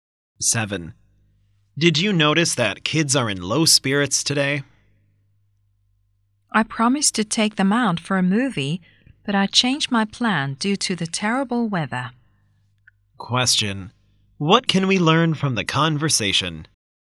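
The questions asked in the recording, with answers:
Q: What can we learn from the conversation?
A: The kids are disappointed because the movie trip was cancelled due to bad weather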